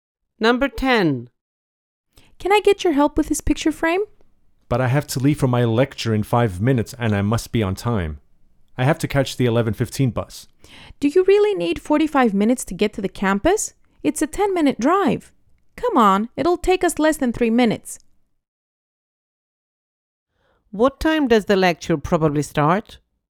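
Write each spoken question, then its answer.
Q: What time does the lecture probably start?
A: At 12:00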